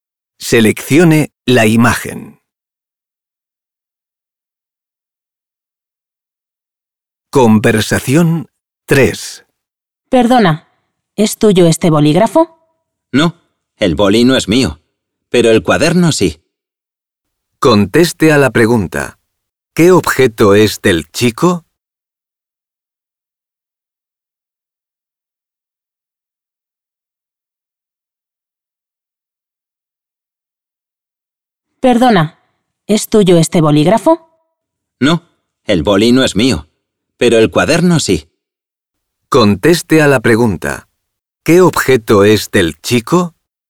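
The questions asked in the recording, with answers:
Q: ¿Qué objeto es del chico?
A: el cuaderno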